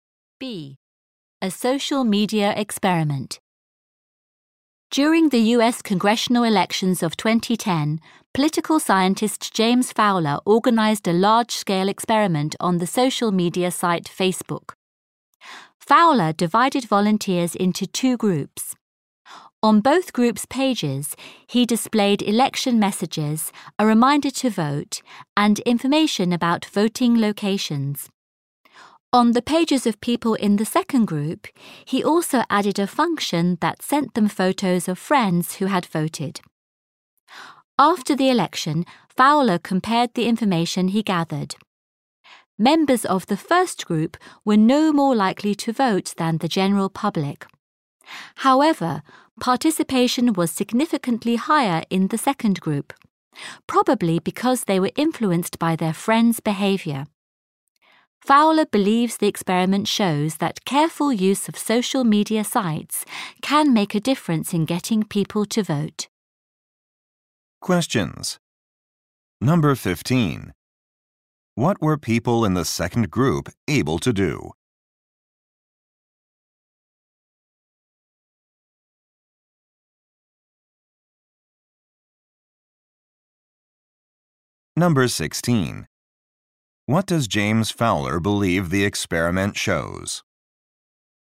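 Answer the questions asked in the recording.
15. See photos of friends who had voted.
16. Careful use of social media can help get people to vote.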